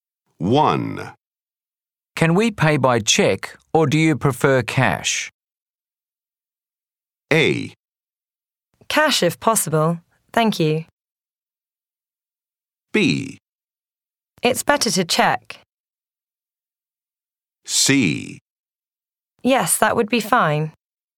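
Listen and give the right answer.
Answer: A: Cash if possible. Thank you.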